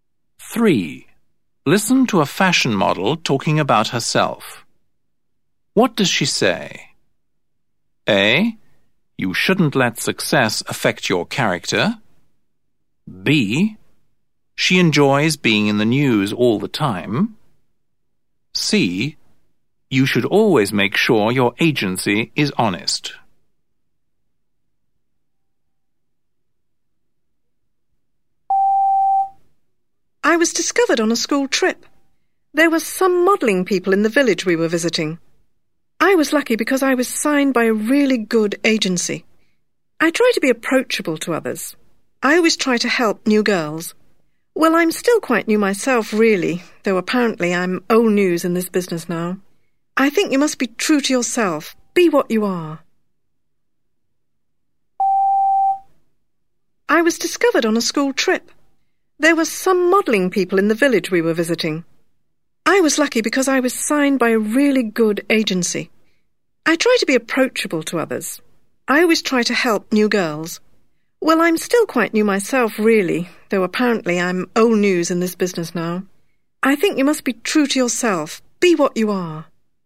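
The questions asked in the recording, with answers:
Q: What does she say?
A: A: You shouldn't let success affect your character.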